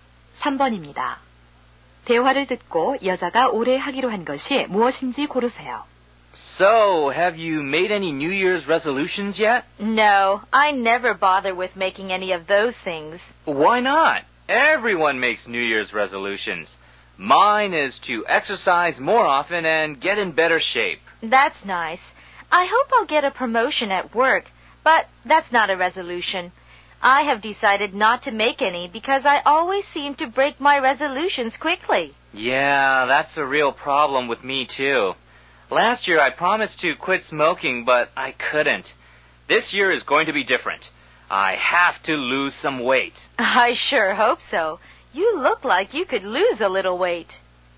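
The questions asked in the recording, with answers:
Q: 대화를 듣고 여자가 올해 하기로 한 것이 무엇인지 고르세요.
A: 살 빼기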